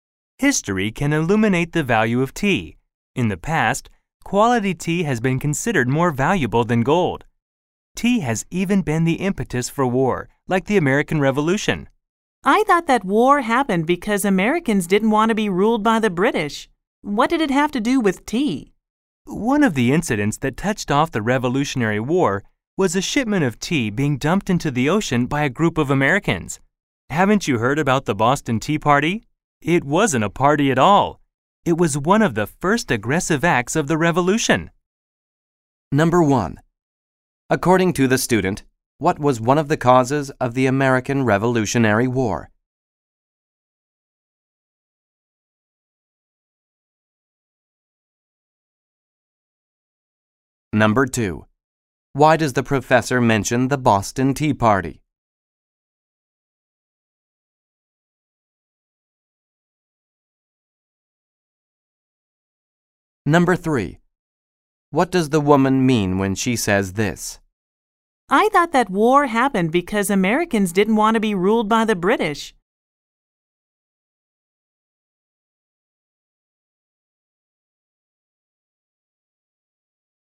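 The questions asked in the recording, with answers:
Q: According to the student, what was one of the causes of the American Revolutionary War?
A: Americans didn't want to be ruled by the British

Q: Why does the professor mention the Boston Tea Party?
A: To give an example of tea helping to start a war (the Revolution)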